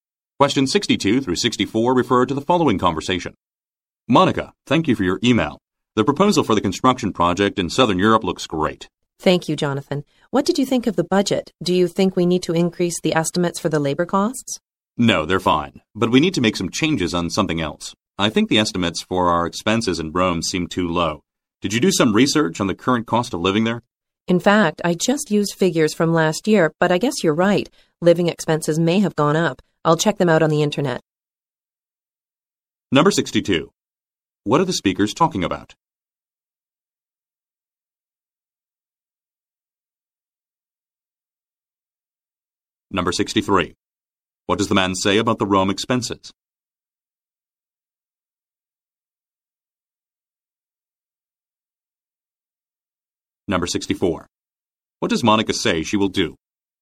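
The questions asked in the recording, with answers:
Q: What are the speakers talking about?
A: A budget proposal for a construction project

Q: What does the man say about the Rome expenses?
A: The estimates seem too low

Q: What does Monica say she will do?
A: Check living costs on the internet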